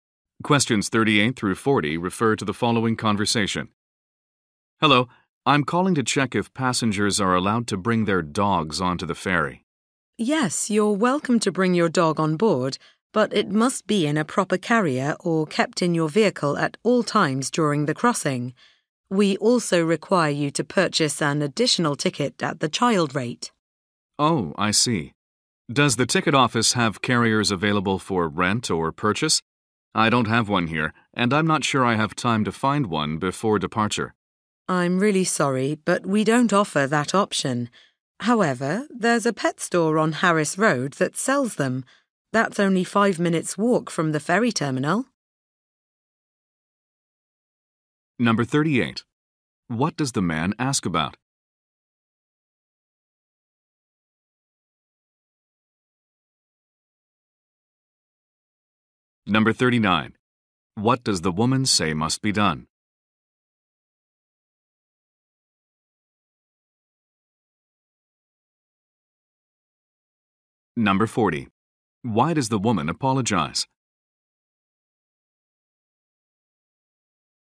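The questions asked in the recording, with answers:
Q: What does the man ask about?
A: Whether he can bring his dog onto the ferry.

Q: Why does the woman apologize?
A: The ferry does not offer carriers for rent or sale.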